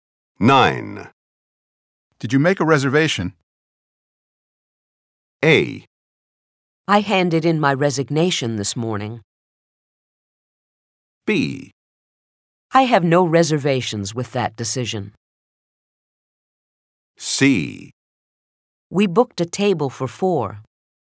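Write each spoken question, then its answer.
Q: Did you make a reservation?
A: C: We booked a table for 4.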